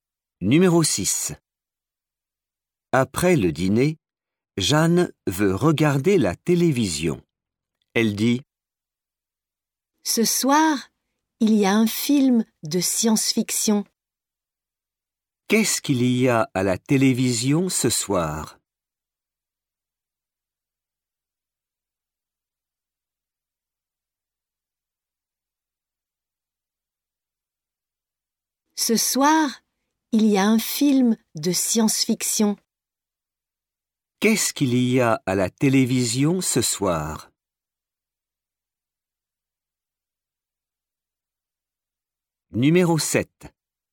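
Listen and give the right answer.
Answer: un film de science-fiction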